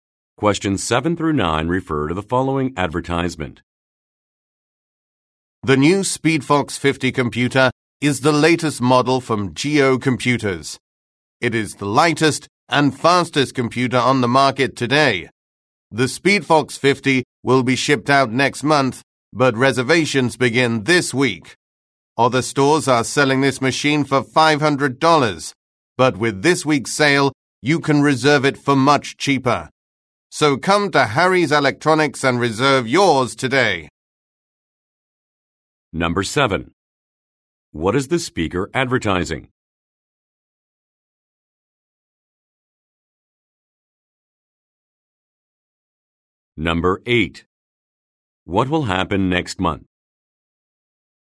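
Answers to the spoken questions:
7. A computer (the SpeedFox 50)
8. The SpeedFox 50 will be shipped out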